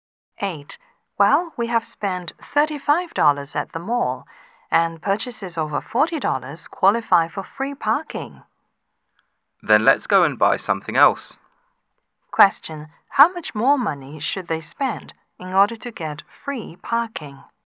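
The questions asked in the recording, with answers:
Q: How much more money should they spend in order to get free parking?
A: More than $5.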